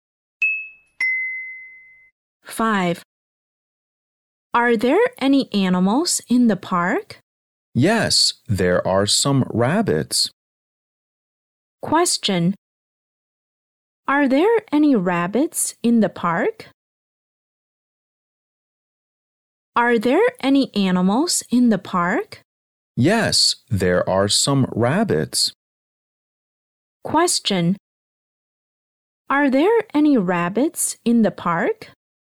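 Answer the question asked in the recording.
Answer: Yes, there are.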